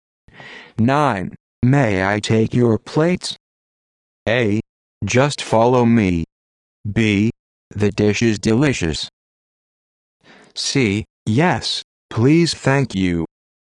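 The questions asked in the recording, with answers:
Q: May I take your plates?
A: C: Yes, please, thank you.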